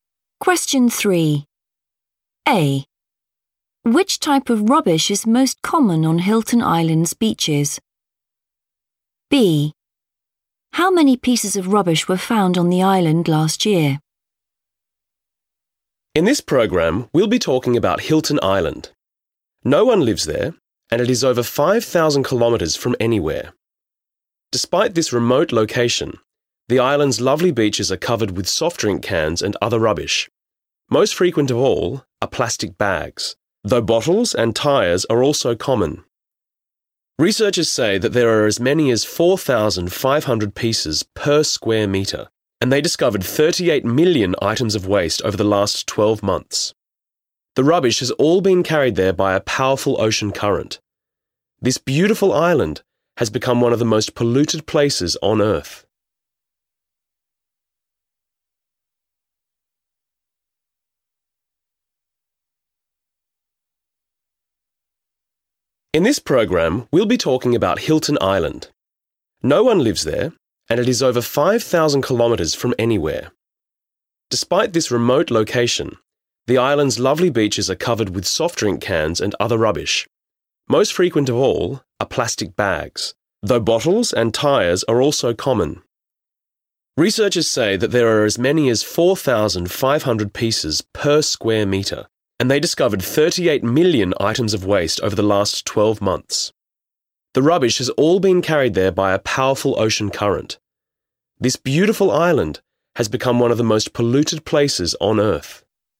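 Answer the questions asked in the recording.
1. plastic bags
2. 38 million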